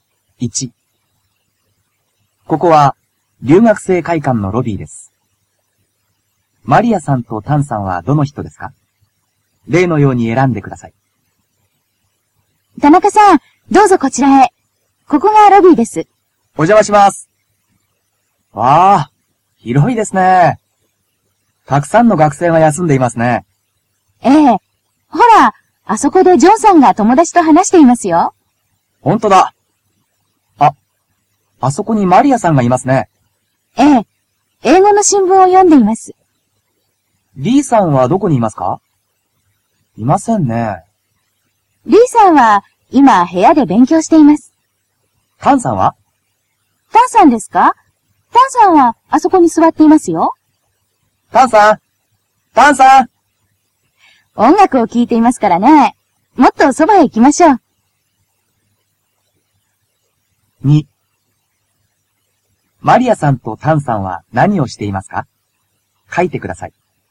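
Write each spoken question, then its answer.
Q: マリアさんとタンさんは何をしていますか?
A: マリアさんは英語の新聞を読んでいます。タンさんは音楽を聴いています。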